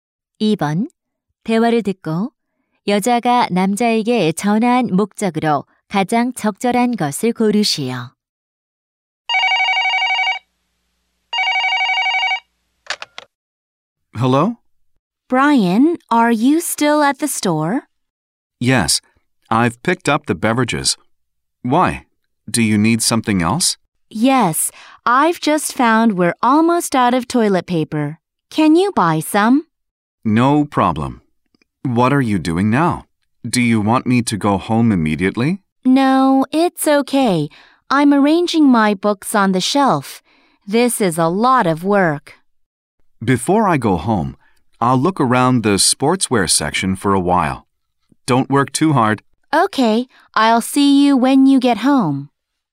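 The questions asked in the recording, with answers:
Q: 대화를 듣고 여자가 남자에게 전화한 목적으로 가장 적절한 것을 고르시오.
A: 화장지를 사 달라고 부탁하려고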